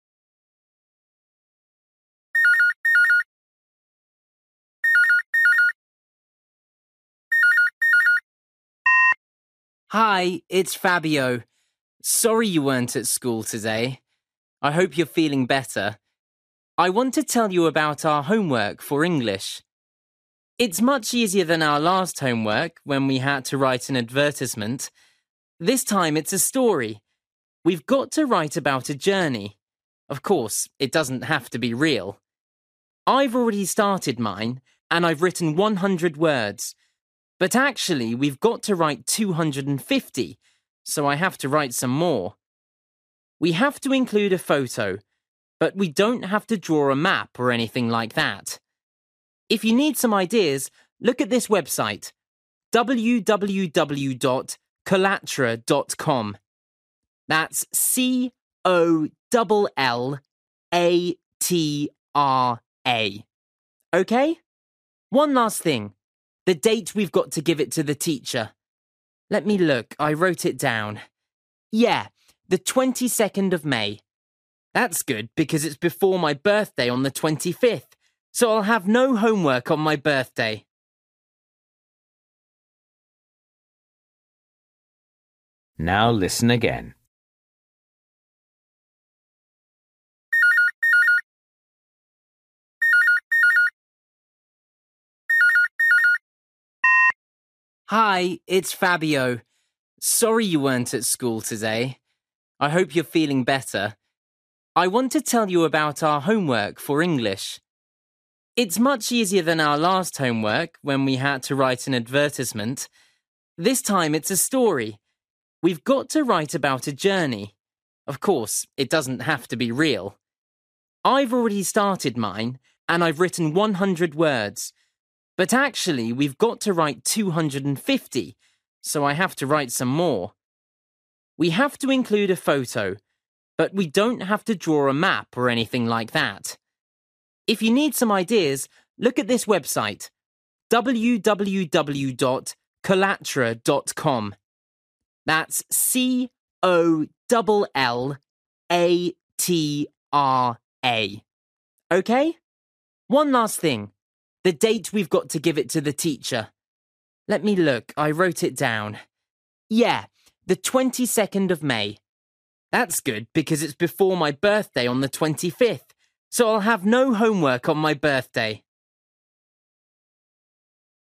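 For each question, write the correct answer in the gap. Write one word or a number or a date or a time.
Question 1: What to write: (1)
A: story

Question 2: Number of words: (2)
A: 250

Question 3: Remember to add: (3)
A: photo

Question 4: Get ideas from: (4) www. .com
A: collatra

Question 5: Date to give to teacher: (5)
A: 22nd May

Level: Luyện nghe trình độ A2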